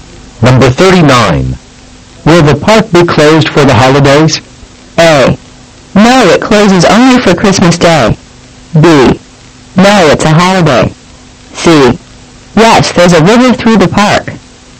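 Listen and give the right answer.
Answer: A: No, it closes only for Christmas Day.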